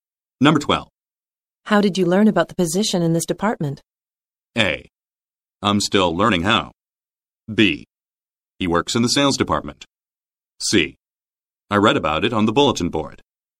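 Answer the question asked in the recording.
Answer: C: I read about it on the bulletin board.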